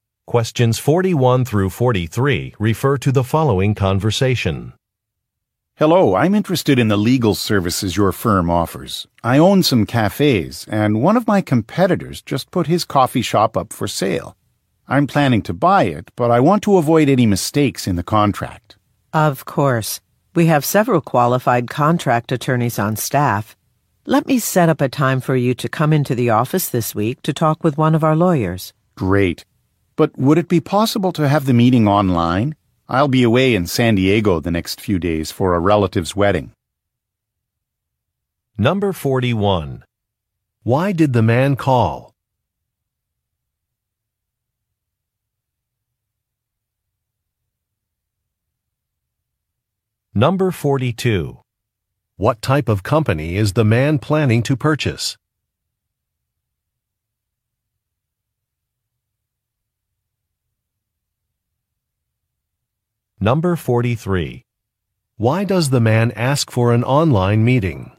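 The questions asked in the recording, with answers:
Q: Why did the man call?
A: To ask about legal services for a purchase contract

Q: What type of company is the man planning to purchase?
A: A coffee shop

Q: Why does the man ask for an online meeting?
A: He will be away in San Diego for a relative's wedding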